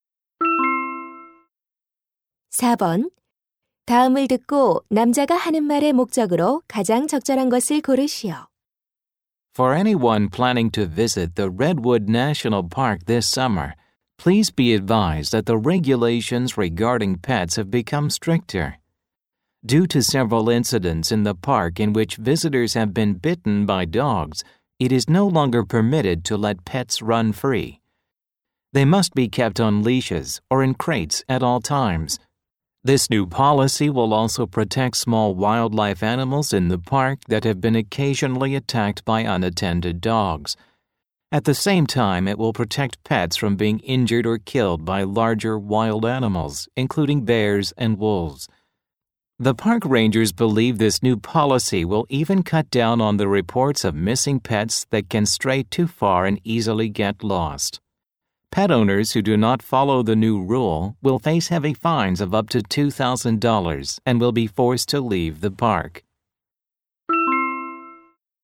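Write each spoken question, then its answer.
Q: 다음을 듣고 남자가 하는 말의 목적으로 가장 적절한 것을 고르시오.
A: 국립공원의 강화된 애완동물 규정을 알리려고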